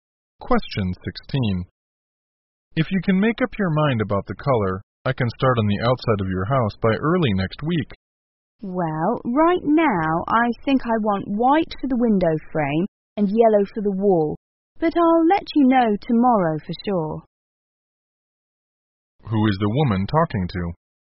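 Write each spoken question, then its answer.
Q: Who is the woman talking to?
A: A house painter.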